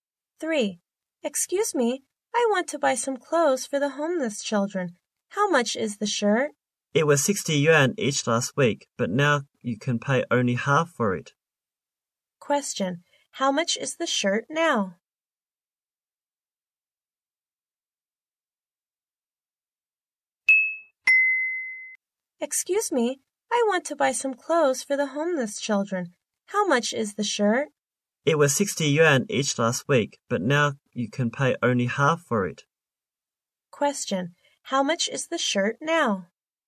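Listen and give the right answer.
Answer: 30 yuan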